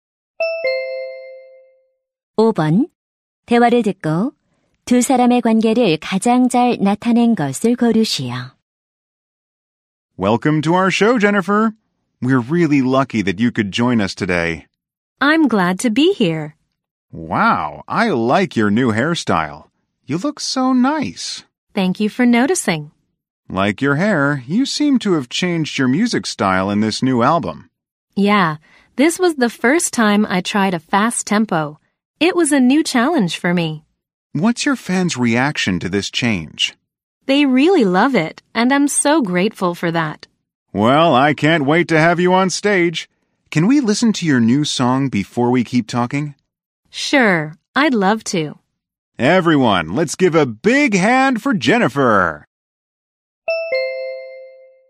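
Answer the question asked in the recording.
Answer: 쇼 진행자 - 가수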